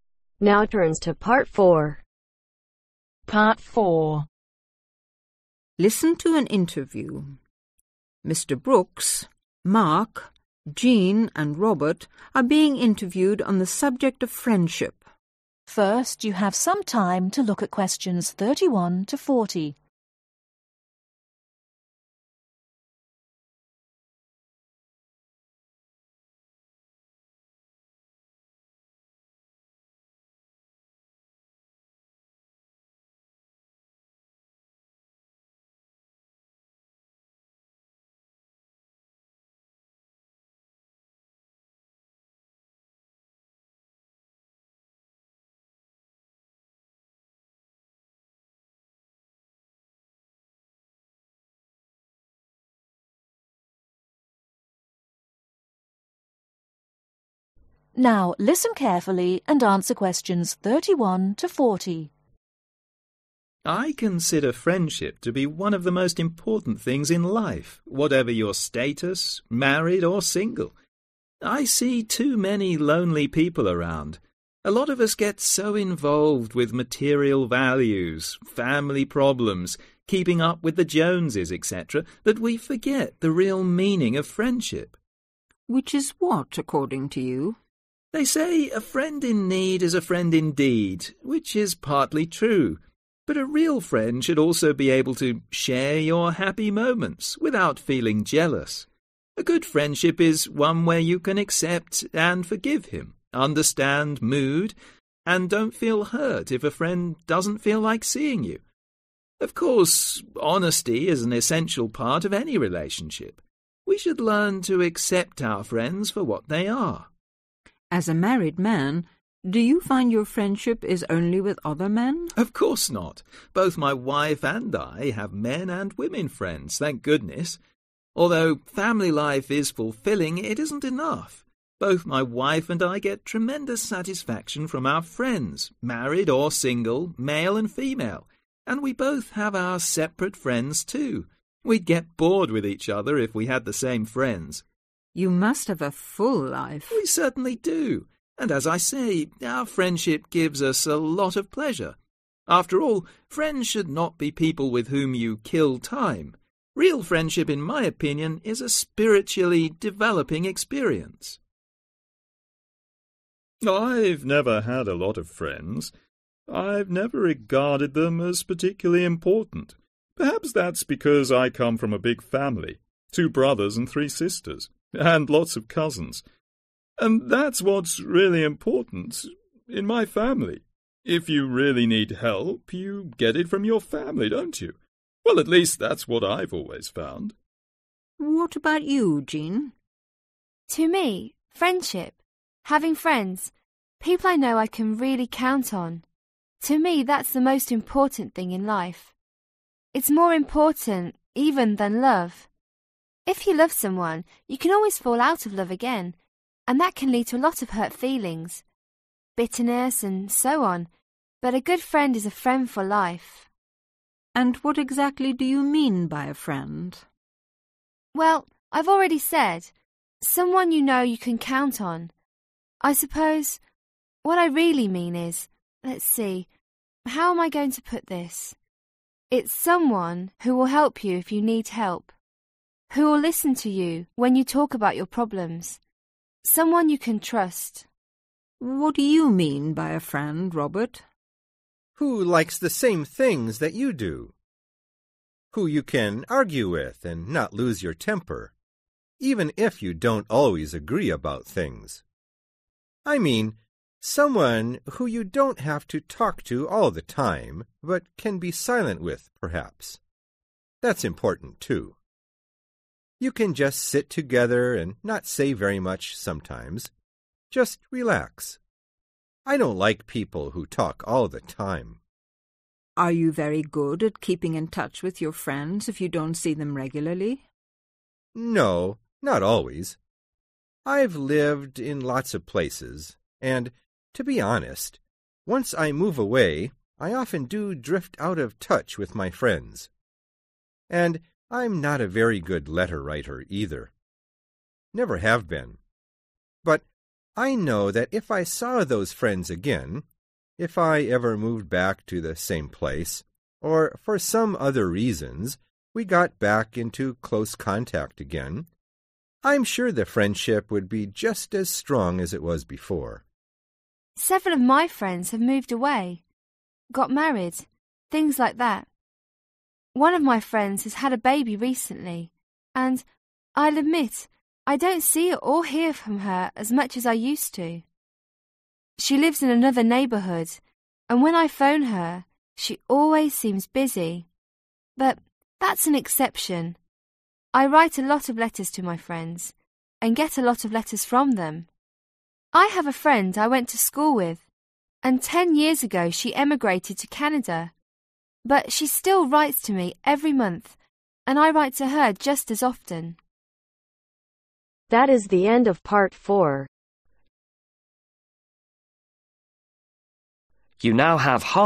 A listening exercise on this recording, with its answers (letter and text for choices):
Complete the table below. Write NO MORE THAN THREE WORDS for each answer.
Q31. A good friendship is one where you can (31)............ him,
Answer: Accept and forgive

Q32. (32)............, and don't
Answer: Understand mood

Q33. don't (33)............ if a friend doesn't feel like seeing you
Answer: Feel hurt

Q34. real friendship is a (34)............ experience.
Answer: Spiritually developing

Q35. Never regarded friends as (35)............ .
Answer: Particularly important

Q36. A friend is someone you know you can (36)............ .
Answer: Count on

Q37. A friend is someone who you can argue with and not (37)............ .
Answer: Lose your temper

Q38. A friend is someone you needn't talk to all the time but can be (38)............ .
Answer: Silent with

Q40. Robert often drifts out of touch with his friends because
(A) he has moved from place to place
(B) making new friends is very easy to him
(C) he does not really care for his friends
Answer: (A) he has moved from place to place